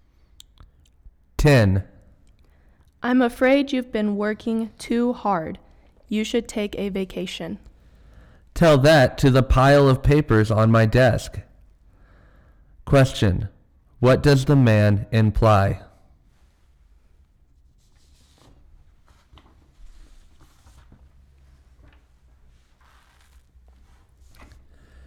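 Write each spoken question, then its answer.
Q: What does the man imply?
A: He has too much work to take a vacation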